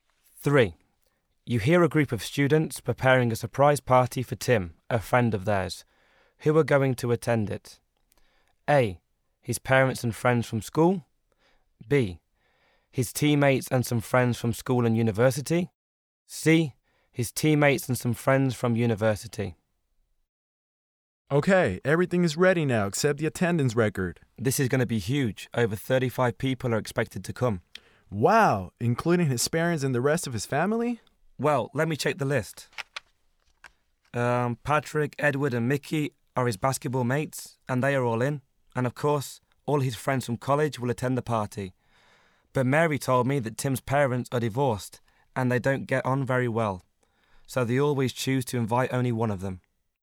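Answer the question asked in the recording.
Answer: C: His teammates and some friends from university.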